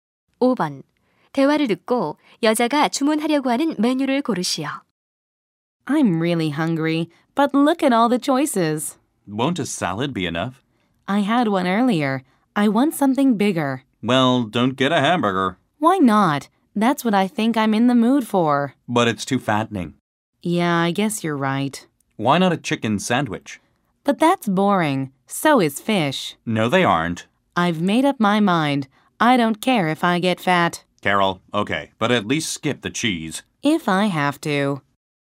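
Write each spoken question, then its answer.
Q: 대화를 듣고 여자가 주문하려고 하는 메뉴를 고르시오.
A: 햄버거 (치즈 없이)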